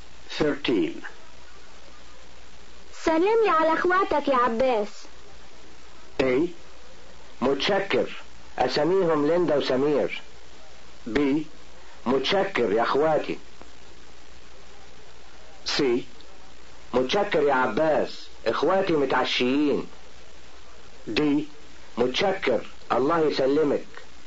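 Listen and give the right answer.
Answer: D: متشكر، الله يسلمك.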